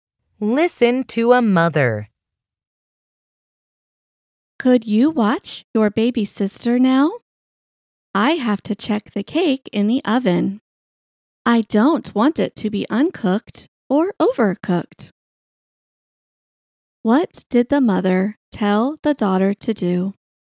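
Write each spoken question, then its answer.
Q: What did the mother tell the daughter to do?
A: Watch her baby sister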